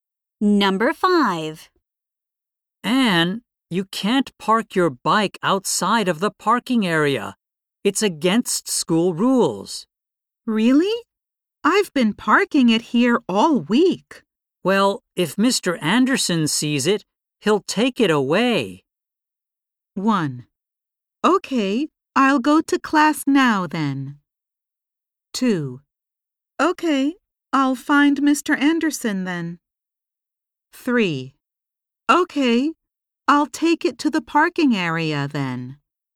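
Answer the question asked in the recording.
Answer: 3: Okay, I'll take it to the parking area then.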